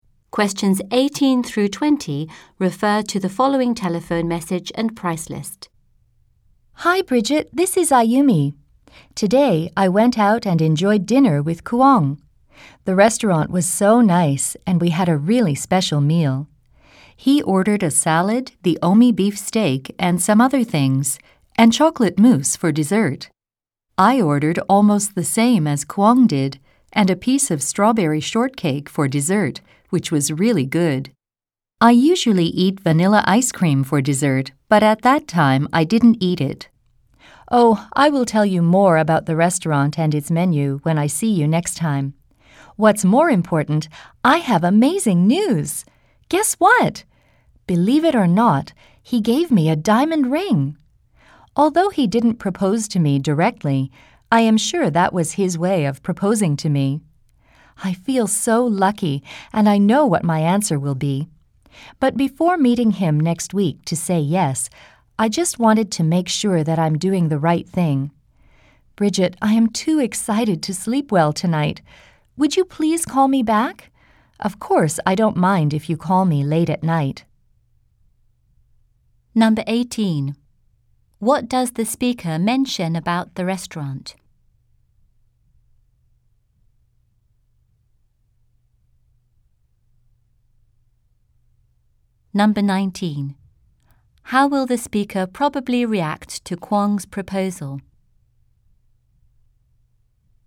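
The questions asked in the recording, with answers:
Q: How will the speaker probably react to Kuang's proposal?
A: She will accept it (say yes).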